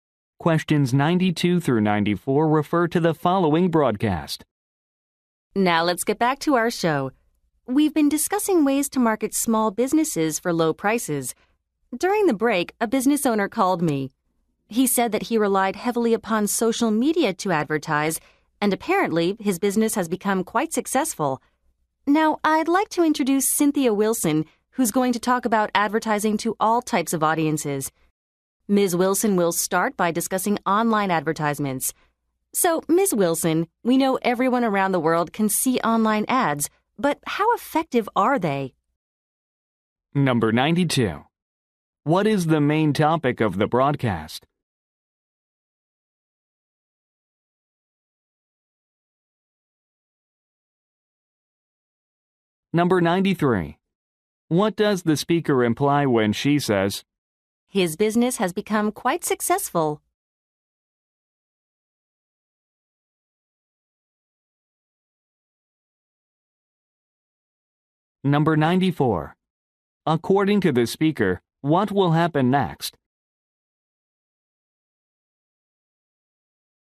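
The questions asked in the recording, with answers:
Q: What is the main topic of the broadcast?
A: Low-cost marketing for small businesses

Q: According to the speaker, what will happen next?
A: Cynthia Wilson will discuss online advertisements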